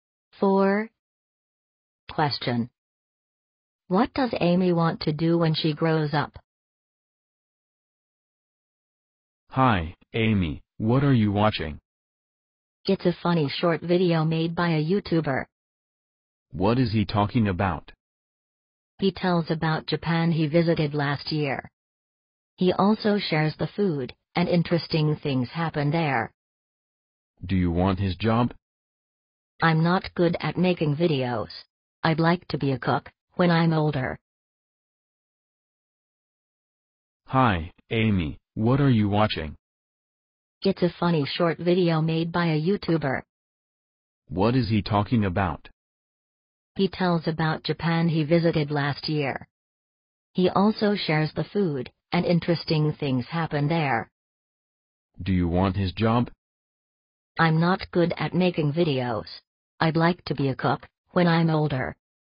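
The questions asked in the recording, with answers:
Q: What does Amy want to do when she grows up?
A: Be a cook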